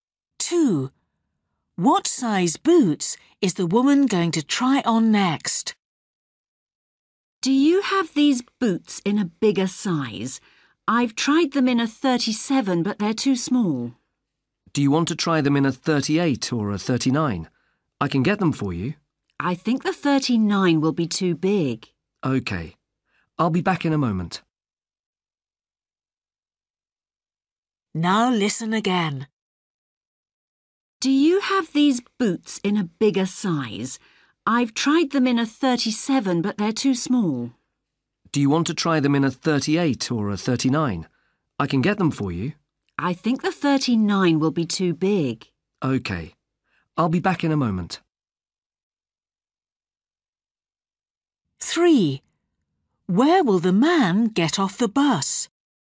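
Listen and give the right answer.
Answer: 38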